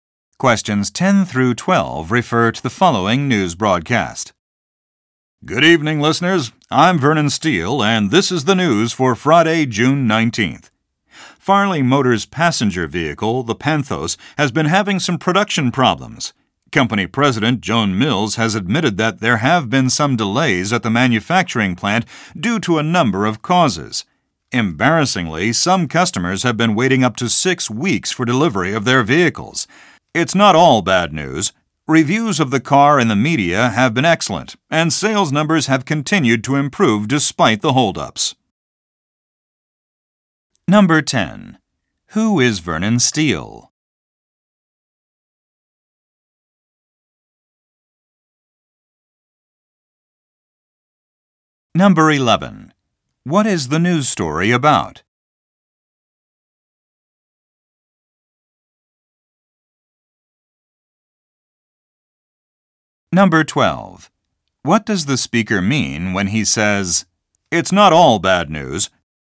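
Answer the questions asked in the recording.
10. A news reporter
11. Production delays of a car
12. The car has good reviews and improving sales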